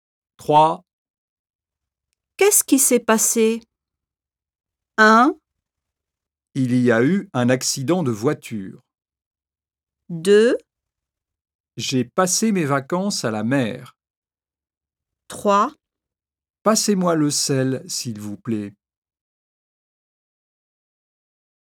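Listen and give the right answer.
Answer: 1: Il y a eu un accident de voiture.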